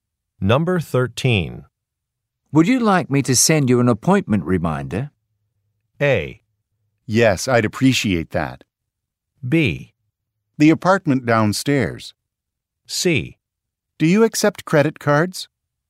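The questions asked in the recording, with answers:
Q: Would you like me to send you an appointment reminder?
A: A: Yes, I'd appreciate that.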